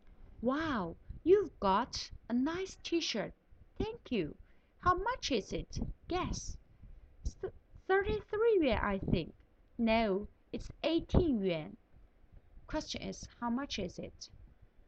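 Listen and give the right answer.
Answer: 18 yuan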